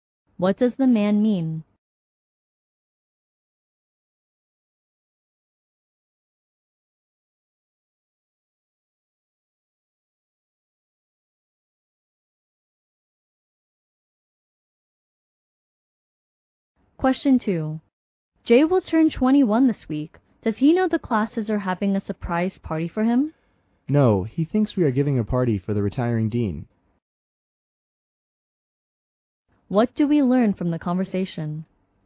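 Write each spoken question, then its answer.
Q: What do we learn from the conversation?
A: Jay doesn't know about his surprise birthday party; he thinks it's for the retiring dean.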